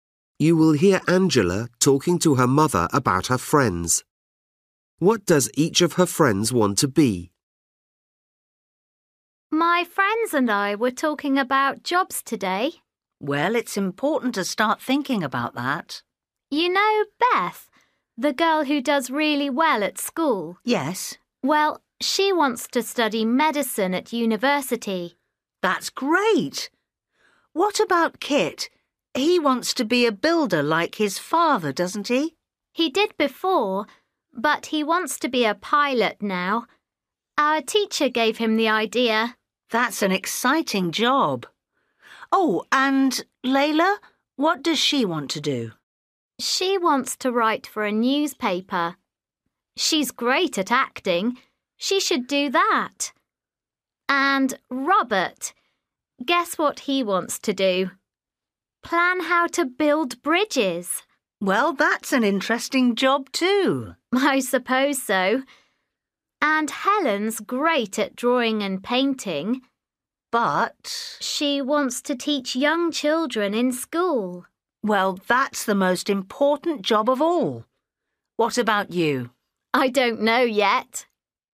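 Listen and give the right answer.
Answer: Beth: doctor; Kit: pilot; Layla: journalist; Robert: engineer; Helen: teacher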